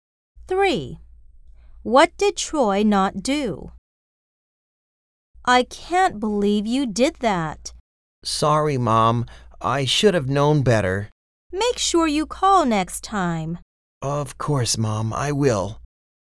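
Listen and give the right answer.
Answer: He didn't call his mom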